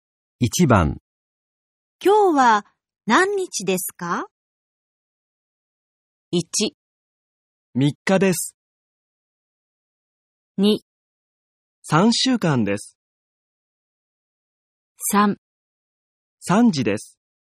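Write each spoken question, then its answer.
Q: 今日は何日ですか?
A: 1: 三日です。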